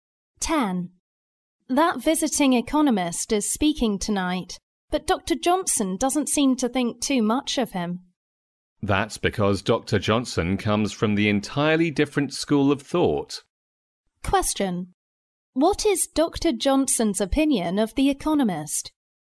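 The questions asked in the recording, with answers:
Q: What is Dr. Johnson's opinion of the economist?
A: He doesn't think highly of him; he disagrees with his views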